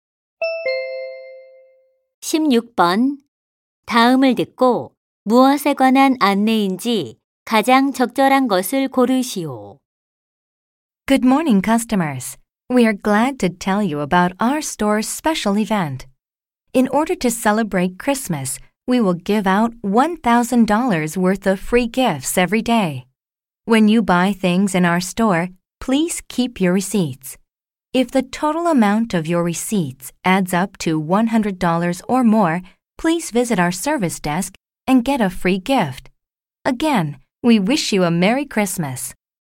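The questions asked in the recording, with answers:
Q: 다음을 듣고 무엇에 관한 안내인지 가장 적절한 것을 고르시오.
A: 크리스마스 기념 사은품 증정 행사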